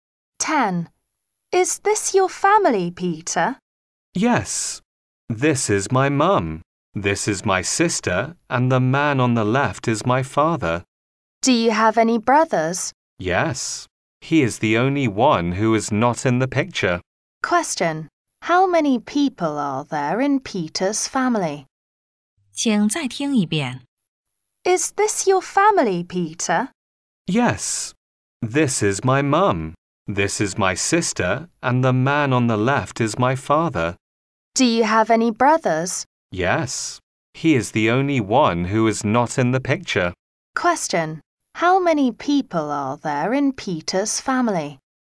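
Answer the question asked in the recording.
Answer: Five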